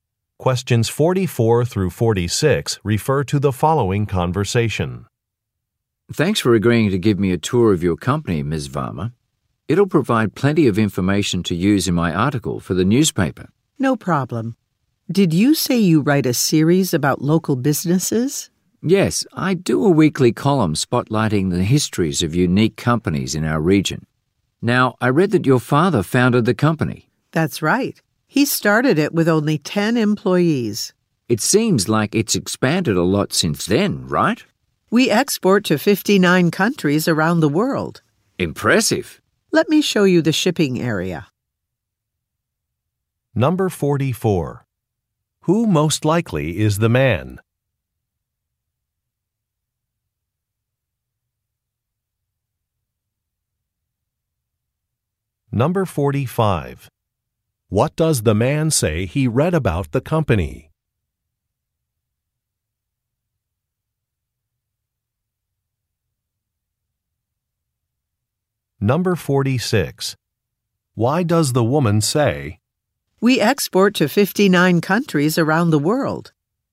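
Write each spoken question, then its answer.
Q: Who most likely is the man?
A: A newspaper journalist

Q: What does the man say he read about the company?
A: The woman's father founded it

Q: "We export to 59 countries around the world"?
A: To confirm the company has expanded a lot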